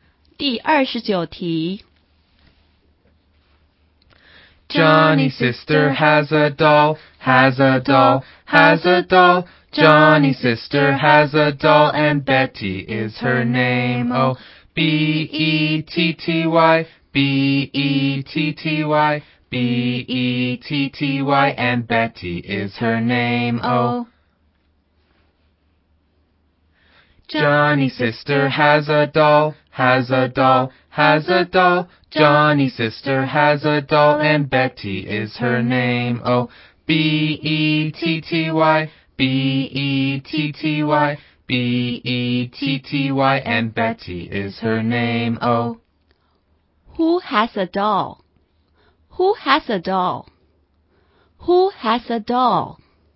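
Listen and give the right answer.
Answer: Johnny's sister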